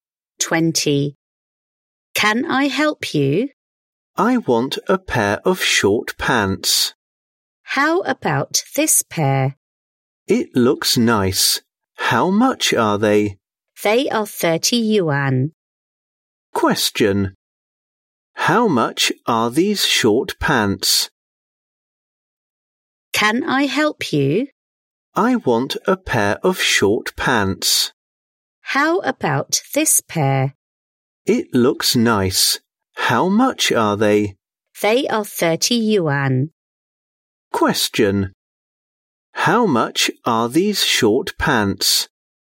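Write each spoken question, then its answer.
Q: Question. How much are these short pants?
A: 30 yuan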